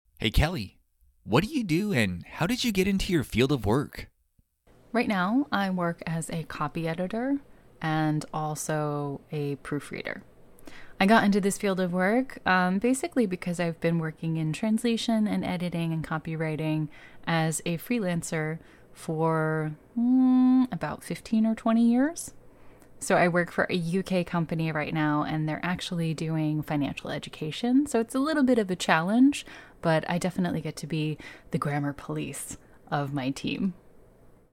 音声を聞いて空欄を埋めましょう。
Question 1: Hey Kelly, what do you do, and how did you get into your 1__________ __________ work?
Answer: field of

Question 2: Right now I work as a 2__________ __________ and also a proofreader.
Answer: copy editor

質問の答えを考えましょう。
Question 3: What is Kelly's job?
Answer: She works as a copy editor and proofreader.

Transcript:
Kelly
Right now I work as a copy editor and also a proofreader. I got into this field of work basically because I've been working in translation and editing and copywriting as a freelancer for about 15 or 20 years. So I work for a UK company right now and they're actually doing financial education, so it's a little bit of a challenge, but I definitely get to be the grammar police of my team.